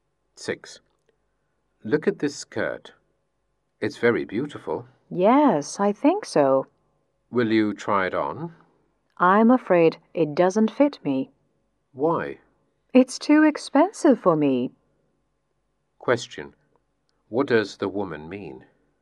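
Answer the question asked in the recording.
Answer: The skirt is too expensive for her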